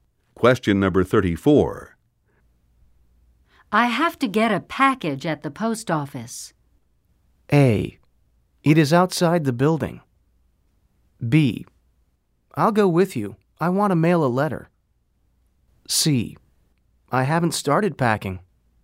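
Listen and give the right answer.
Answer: B: I'll go with you. I want to mail a letter.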